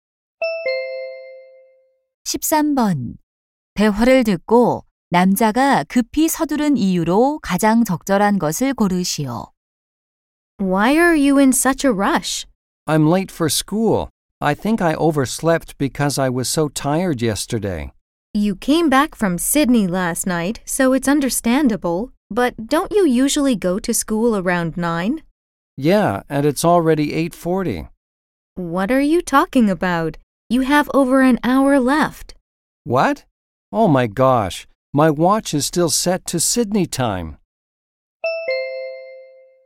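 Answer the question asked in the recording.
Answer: 시계가 아직 시드니 시간에 맞춰져 있어서 (학교에 늦었다고 착각해서)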